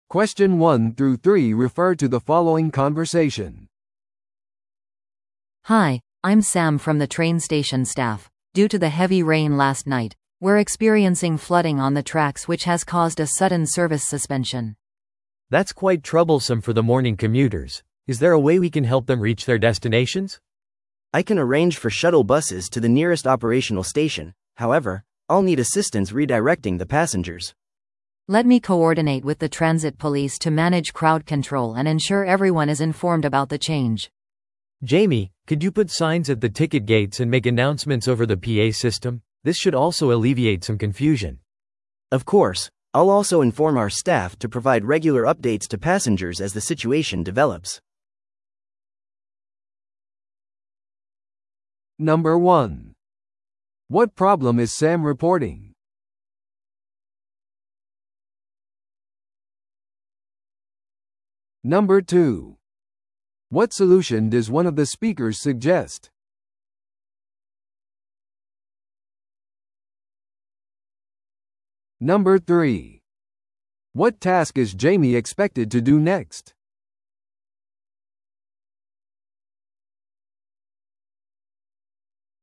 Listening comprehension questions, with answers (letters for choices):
Listen to the audio below and answer the questions.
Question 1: What problem is Sam reporting?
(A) 列車のスケジュールの遅れ。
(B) 信号システムの電気故障。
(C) 線路の浸水事故。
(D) 列車スタッフの不足。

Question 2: What solution does one of the speakers suggest?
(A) 洪水が引くのを待つ。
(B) 代替交通機関のためのバウチャーを提供する。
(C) 他の駅までのシャトルバスを手配する。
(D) その日のすべての列車サービスをキャンセルする。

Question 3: What task is Jamie expected to do next?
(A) 洪水救済作業を助ける。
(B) サインを置いて公共のアナウンスを行う。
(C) シャトルバスのドライバーと調整する。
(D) 足止めされた乗客に応急処置を提供する。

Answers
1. C
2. C
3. B

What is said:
A: Hi, I'm Sam from the train station staff. Due to the heavy rain last night, we're experiencing flooding on the tracks which has caused a sudden service suspension.
B: That's quite troublesome for the morning commuters. Is there a way we can help them reach their destinations?
C: I can arrange for shuttle buses to the nearest operational station. However, I'll need assistance redirecting the passengers.
A: Let me coordinate with the transit police to manage crowd control and ensure everyone is informed about the change.
B: Jamie, could you put signs at the ticket gates and make announcements over the PA system? This should also alleviate some confusion.
C: Of course. I'll also inform our staff to provide regular updates to passengers as the situation develops.